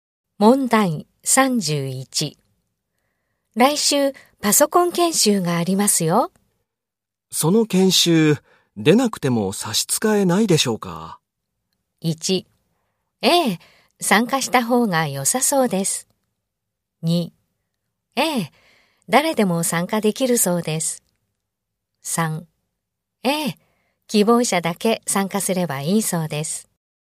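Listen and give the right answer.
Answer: 3: ええ、希望者だけ参加すればいいそうです。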